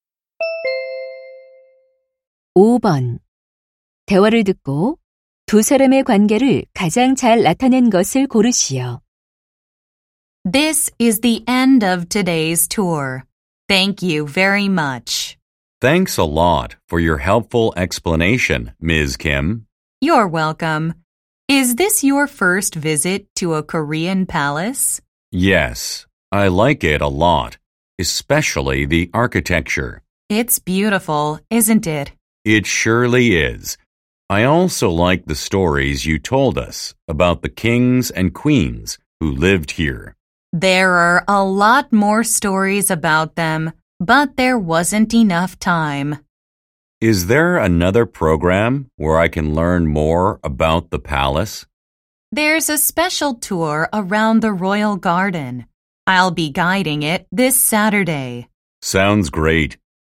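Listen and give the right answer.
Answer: 궁궐 관광 가이드 - 관광객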